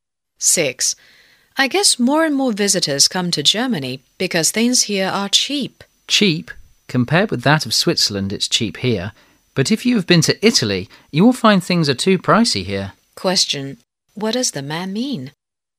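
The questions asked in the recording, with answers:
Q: What does the man mean?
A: Prices in Germany are neither cheap nor expensive; it depends on the comparison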